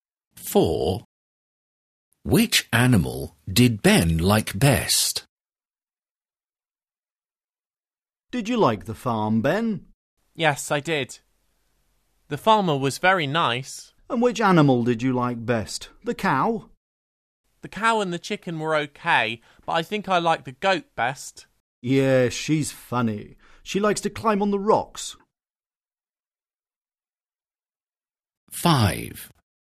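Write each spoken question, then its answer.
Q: Which animal did Ben like best?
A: The goat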